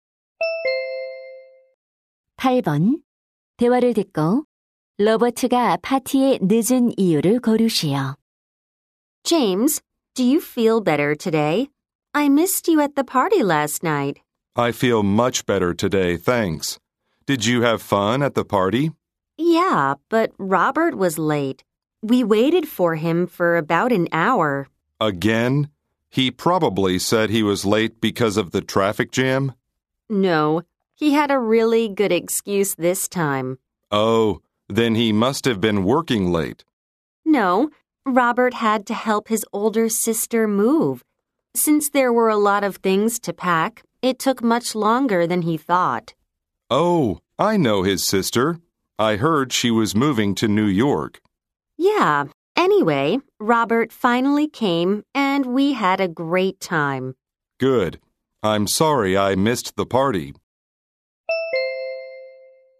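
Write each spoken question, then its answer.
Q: 로버트가 파티에 늦은 이유를 고르시오.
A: 누나의 이사를 도와야 해서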